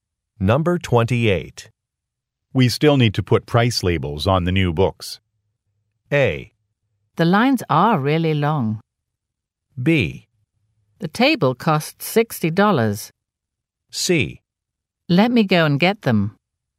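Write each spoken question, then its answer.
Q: We still need to put price labels on the new books.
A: C: Let me go and get them.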